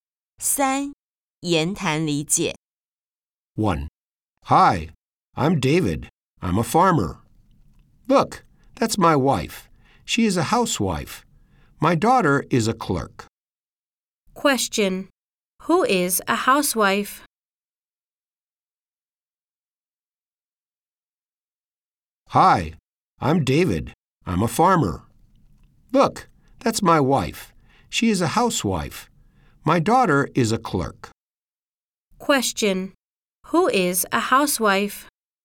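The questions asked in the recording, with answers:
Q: Who is a housewife?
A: David's wife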